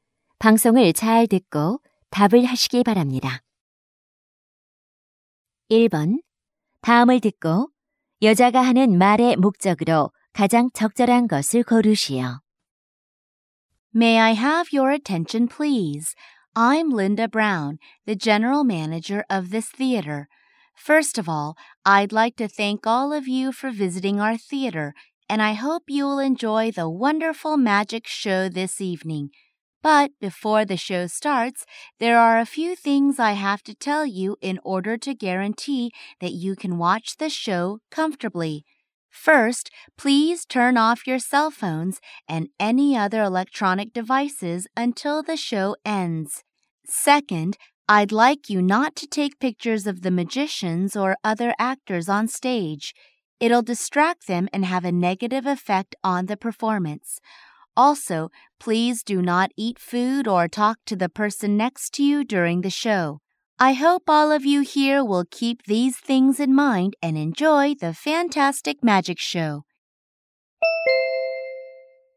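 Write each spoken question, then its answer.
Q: 다음을 듣고 여자가 하는 말의 목적으로 가장 적절한 것을 고르시오.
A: 공연 관람 시 지켜야 할 주의 사항을 안내하려고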